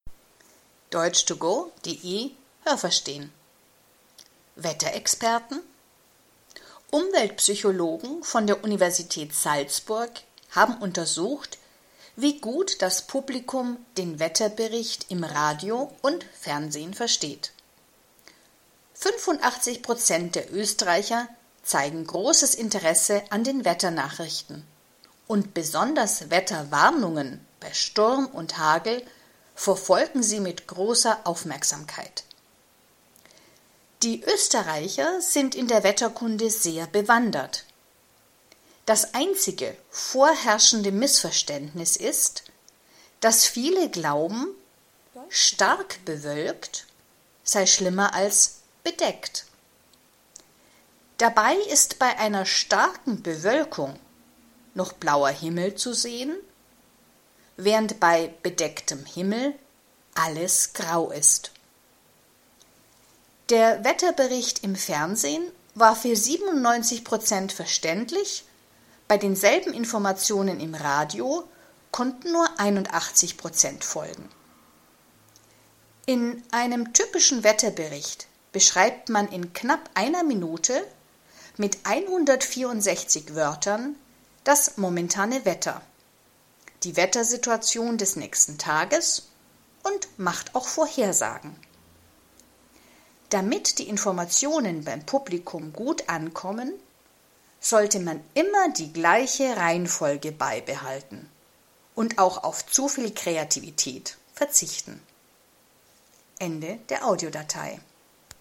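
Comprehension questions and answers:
Haben Sie das gehört? Stimmt diese Aussage?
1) An der Universität Salzburg wollte man wissen, wie gut der Wetterbericht im Fernsehen und Radio gemacht ist.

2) 85 % der Österreicher verfolgen Wetterwarnungen bei Sturm und Hagel.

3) Die Österreicher kennen sich sehr gut aus, was die Wetterkunde betrifft.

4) Wenn es im Wetterbericht heißt „stark bewölkt", dann ist das schlimmer als „bedeckt".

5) Den Wetterbericht im Fernsehen konnten mehr Leute verstehen als den Wetterbericht im Radio.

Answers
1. Nein, das habe ich nicht gehört.
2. Nein, das habe ich nicht gehört.
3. Ja, das habe ich gehört.
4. Nein, das habe ich nicht gehört.
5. Ja, das habe ich gehört.

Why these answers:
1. Man wollte wissen, wie gut das Publikum den Wetterbericht im Fernsehen und Radio versteht.
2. 85 % der Österreicher interessieren sich für den Wetterbericht.
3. „Sie sind in der Wetterkunde sehr bewandert" bedeutet: Sie wissen sehr gut Bescheid.
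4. Das glauben viele Österreicher, aber bei „stark bewölkt" sieht man noch einen blauen Himmel, bei „bedeckt" ist alles grau.

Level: B1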